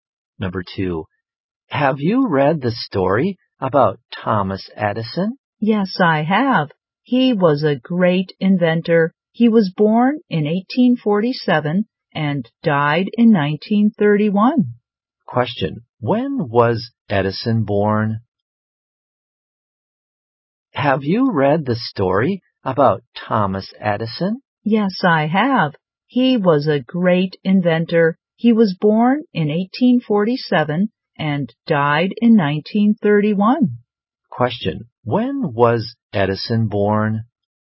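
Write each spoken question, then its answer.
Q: when was Edison born?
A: In 1847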